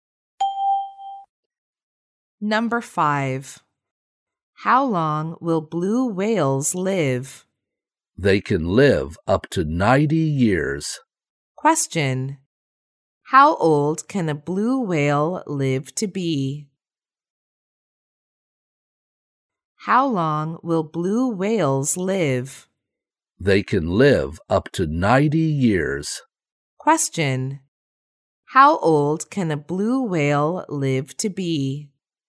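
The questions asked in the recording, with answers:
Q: How old can a blue whale live to be?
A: Up to 90 years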